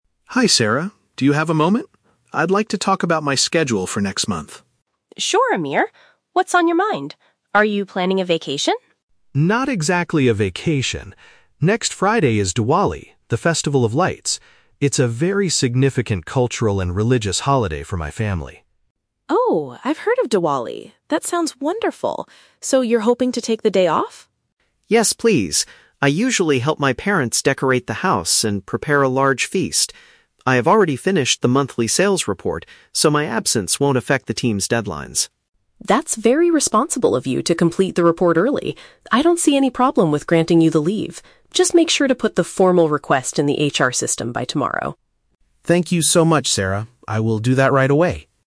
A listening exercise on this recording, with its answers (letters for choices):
Listen to a conversation between an employee and his manager, and choose the correct answer (A, B, or C) for each question.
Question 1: What is the main reason Amir wants to take a day off?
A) To travel abroad for a long summer vacation.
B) To celebrate an important traditional event with his relatives.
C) To attend a religious ceremony at his local community center.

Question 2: What has Amir done to ensure his absence won't cause problems?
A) He asked another colleague to complete his tasks.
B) He submitted an official email to the human resources department.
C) He finished an important work assignment ahead of schedule.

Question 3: What does Sarah ask Amir to do before taking his leave?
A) Submit an official application through the company's software.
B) Explain the meaning of the Festival of Lights to the rest of the team.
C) Finish updating the monthly sales document before Friday.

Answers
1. B
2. C
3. A

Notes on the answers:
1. Amir mentions that it is a "significant cultural and religious holiday" and he wants to help his "parents" (relatives). Option (B) uses synonyms to express this. Option (A) is a trap; Sarah asks if he is planning a "vacation," but Amir says "not exactly." Option (C) sounds plausible for a religious holiday, but a "community center" is never mentioned (he celebrates at his parents' house).
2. Amir states, "I have already finished the monthly sales report." Option (C) accurately paraphrases this ("monthly sales report" = important work assignment, "already finished" = ahead of schedule). Option (B) is a trap; the HR department is mentioned, but he hasn't submitted the request yet. Option (A) is a plausible guess but is not mentioned in the audio.
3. Sarah tells Amir to "put the formal request in the HR system." Option (A) uses paraphrasing ("formal request" = official application, "HR system" = company's software). Option (B) is a trap; she says she has heard of the festival, but she does not ask him to explain it to the team. Option (C) is a trap; the sales report is mentioned, but Amir has already finished it, so Sarah does not need to ask him to do it.

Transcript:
Amir: Hi Sarah, do you have a moment? I'd like to talk about my schedule for next month.
Sarah: Sure, Amir. What's on your mind? Are you planning a vacation?
Amir: Not exactly a vacation. Next Friday is Diwali, the Festival of Lights. It's a very significant cultural and religious holiday for my family.
Sarah: Oh, I've heard of Diwali! That sounds wonderful. So you're hoping to take the day off?
Amir: Yes, please. I usually help my parents decorate the house and prepare a large feast. I have already finished the monthly sales report, so my absence won't affect the team's deadlines.
Sarah: That's very responsible of you to complete the report early. I don't see any problem with granting you the leave. Just make sure to put the formal request in the HR system by tomorrow.
Amir: Thank you so much, Sarah. I will do that right away.